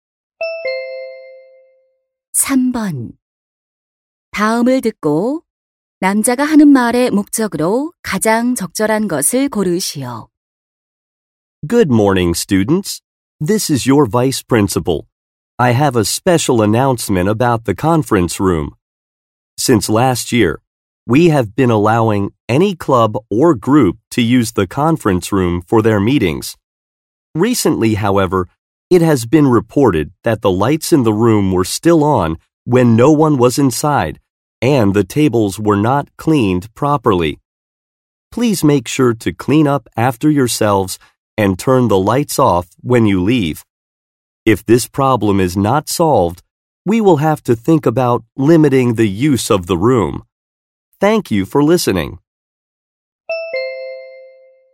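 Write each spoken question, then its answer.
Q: 다음을 듣고 남자가 하는 말의 목적으로 가장 적절한 것을 고르시오.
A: 회의실 사용 후 청소하고 불을 끄도록 당부하려고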